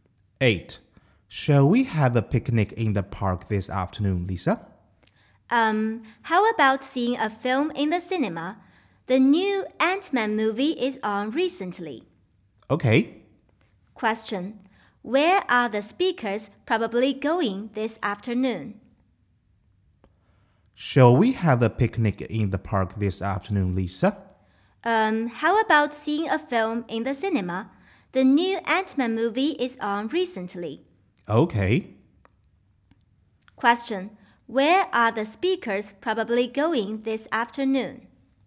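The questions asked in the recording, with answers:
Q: Where are the speakers probably going this afternoon?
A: To the cinema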